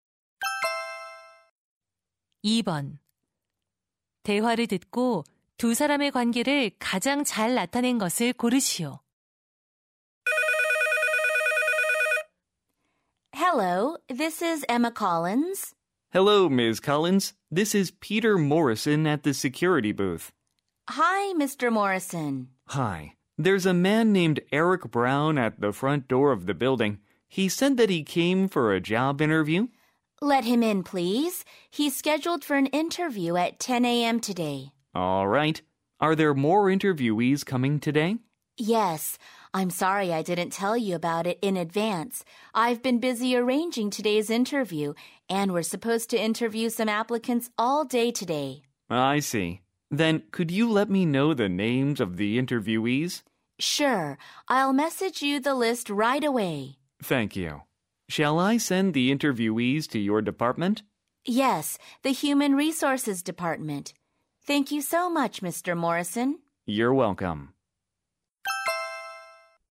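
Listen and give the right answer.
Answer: 인사부 직원 - 건물 경비원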